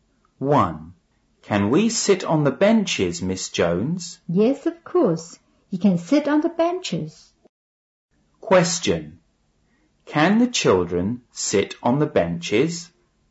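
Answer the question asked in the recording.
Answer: Yes, they can.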